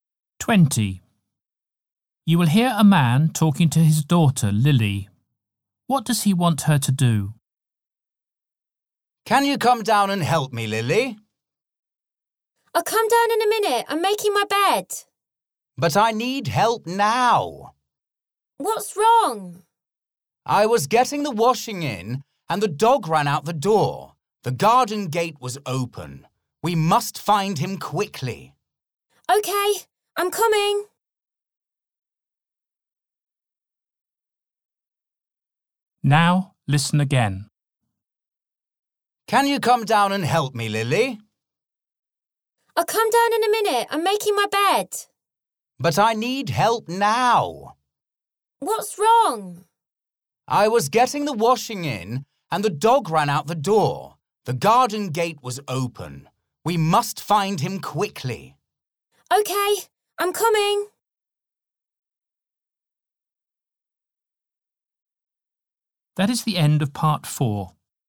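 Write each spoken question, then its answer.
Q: What does he want her to do?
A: Help him find the dog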